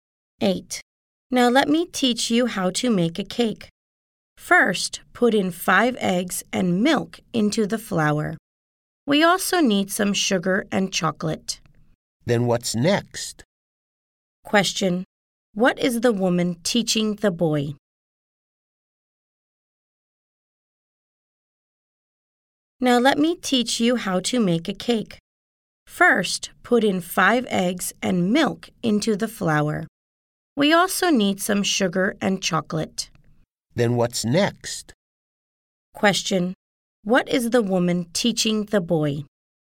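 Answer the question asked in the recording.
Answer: How to make a cake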